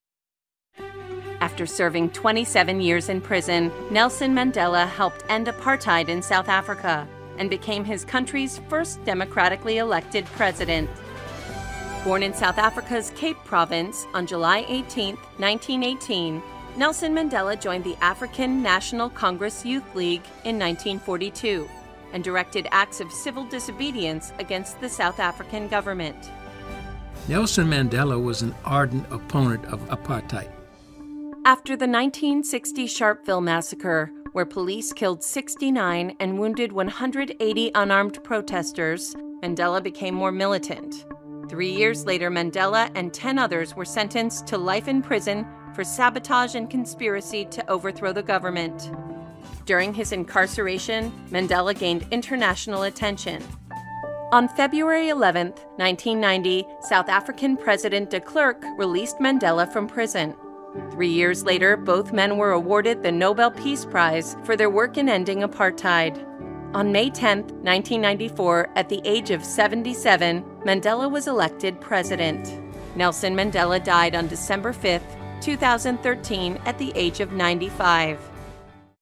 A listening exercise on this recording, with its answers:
Now, listen again and answer the following questions.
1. How long was Mandela in prison?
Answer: 27 years

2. When was he released?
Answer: 11th of February, 1990

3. When did he become President?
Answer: 10th of May, 1994

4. When did he receive the Nobel Peace Prize?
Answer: 1993

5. When was he born?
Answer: 18th of July, 1918

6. When did he pass away?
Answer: 5th of December, 2013

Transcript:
After serving 27 years in prison, Nelson Mandela helped end apartheid in South Africa and became his country's first democratically elected president.
Born in South Africa's Cape Province on July 18, 1918, Nelson Mandela joined the African National Congress (ANC) Youth League in 1942 and directed active civil disobedience against the South African government. Mandela was an active opponent of apartheid.
After the 1960 Sharpeville massacre, where police killed 69 and wounded 180 unarmed protesters, Mandela became more militant. Three years later, in 1963, Mandela and ten others were sentenced to life in prison for sabotage and conspiracy to overthrow the government. During his incarceration, Mandela gained international attention.
On February 11, 1990, South African president de Klerk released Mandela from prison. Three years later, both men were awarded the Nobel Peace Prize for their work on ending apartheid. On May 10, 1994, at the age of 77, Mandela was elected President of South Africa.
Nelson Mandela passed away on December 5, 2013, at the age of 95.
Listen to the biography of Nelson Mandela.